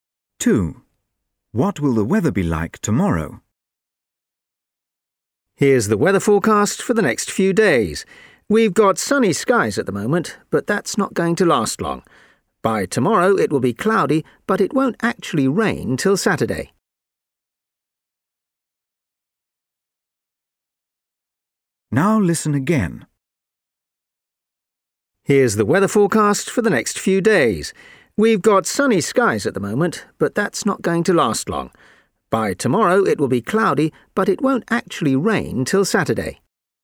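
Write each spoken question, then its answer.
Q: What will the weather be like tomorrow?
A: Cloudy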